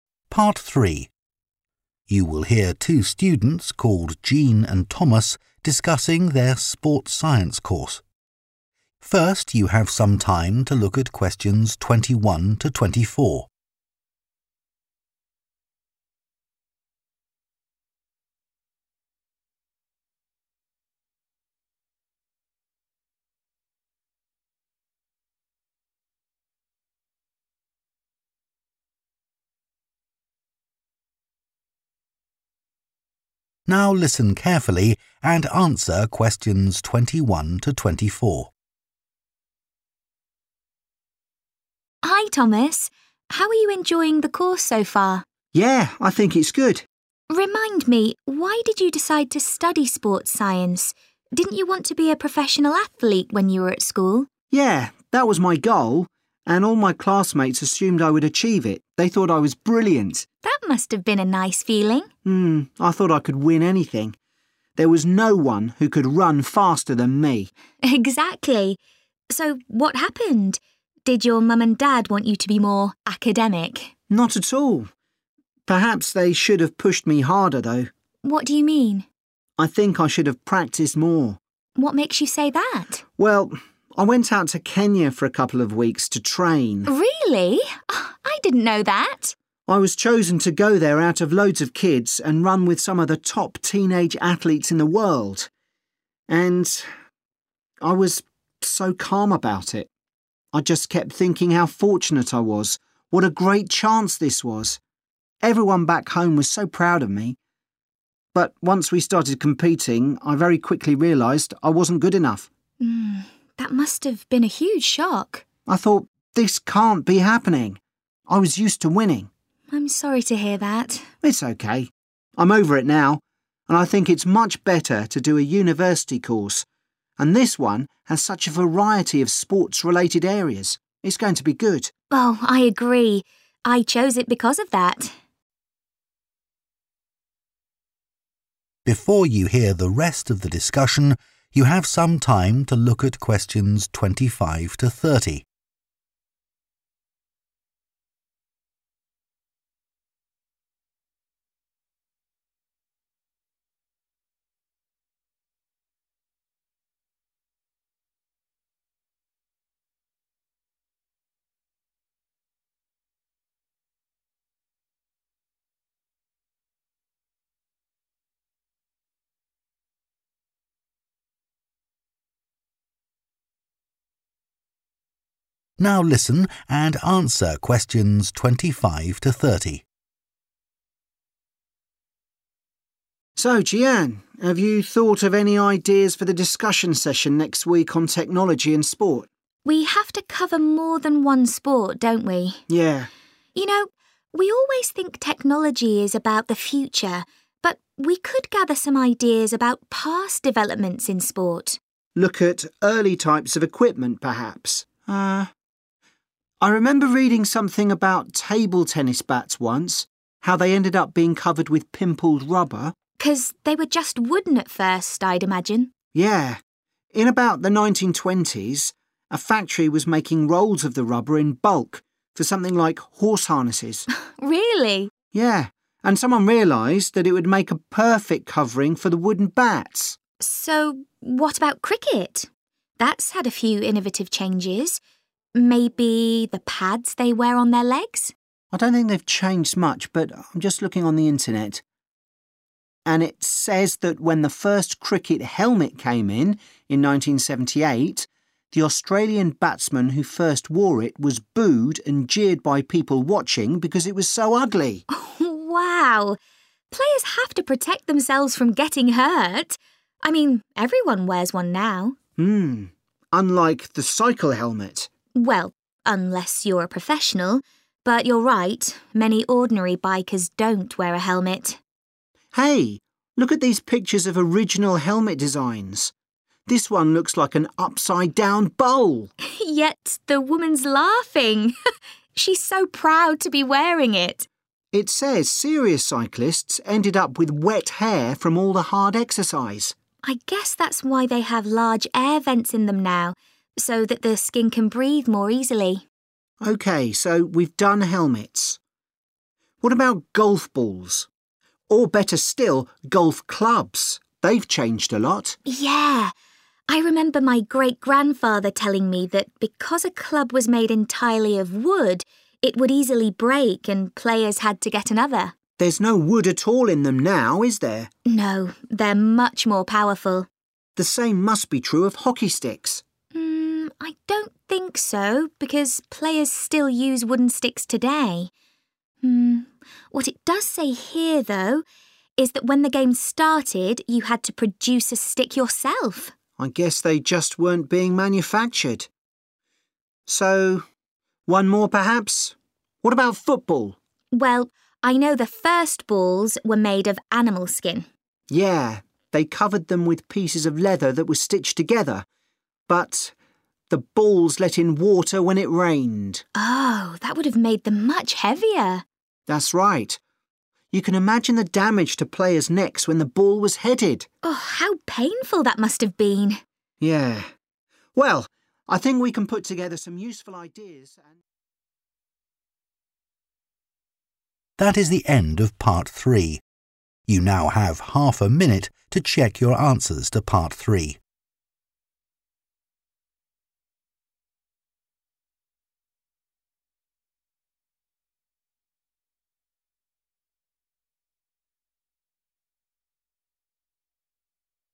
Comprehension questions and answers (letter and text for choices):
Choose TWO letters, A-E.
Which TWO feelings did Thomas experience when he was in Kenya?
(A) disbelief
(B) relief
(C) stress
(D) gratitude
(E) homesickness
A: (A) disbelief

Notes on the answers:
I thought 'this can't be happening' [Tôi đã nghĩ "điều này không thể nào đang xảy ra" → Chọn đáp án A]